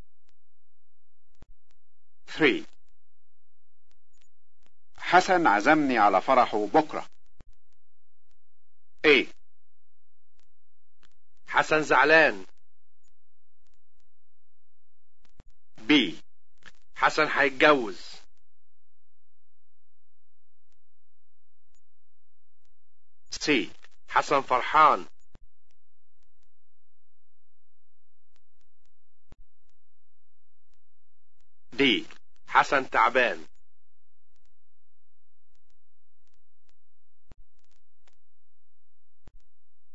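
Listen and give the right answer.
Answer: B: حسن هيتجوز.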